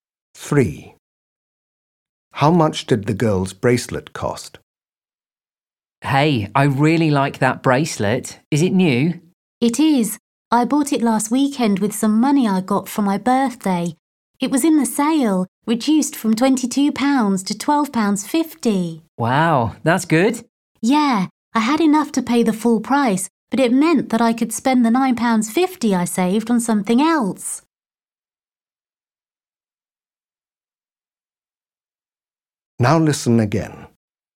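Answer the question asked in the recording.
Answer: £12.50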